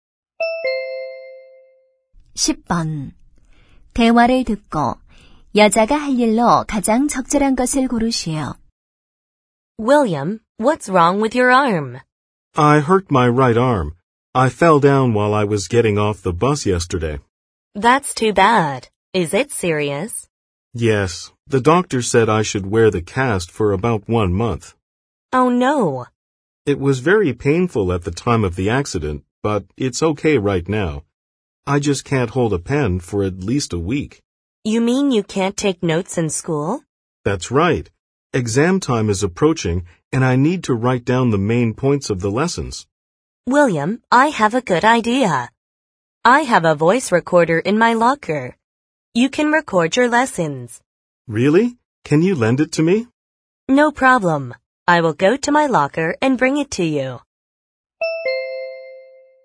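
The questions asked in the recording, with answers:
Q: 대화를 듣고 여자가 할 일로 가장 적절한 것을 고르시오.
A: 사물함에서 녹음기를 가져다주기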